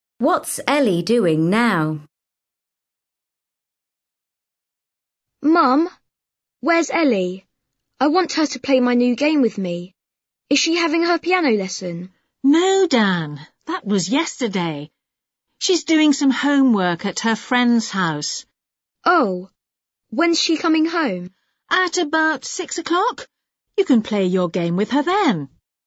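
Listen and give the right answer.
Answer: Doing homework at her friend's house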